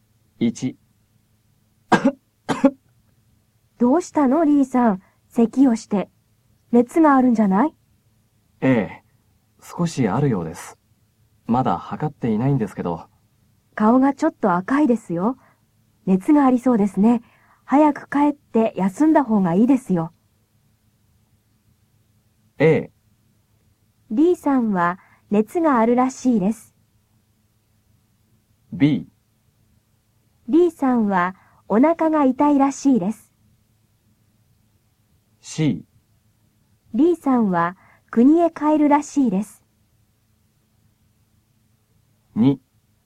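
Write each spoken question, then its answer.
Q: リーさんは国へ帰るらしいです。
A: A: リーさんは熱があるらしいです。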